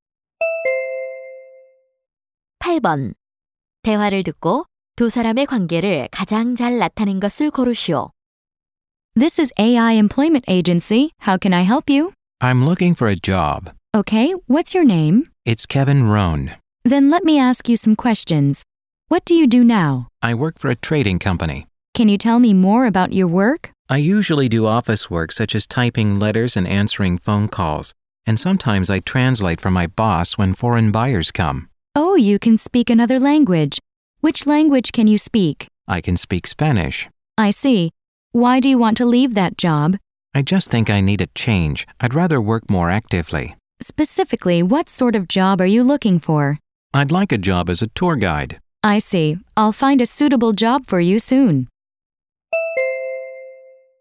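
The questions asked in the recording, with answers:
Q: 대화를 듣고 두 사람의 관계를 가장 잘 나타낸 것을 고르시오.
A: 직업소개소 직원과 구직자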